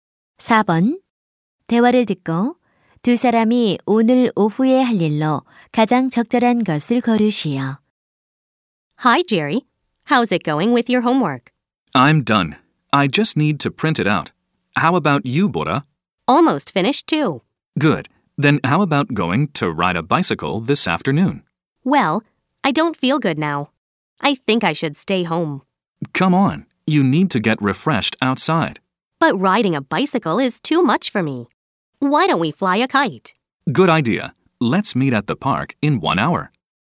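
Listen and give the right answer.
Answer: 연 날리기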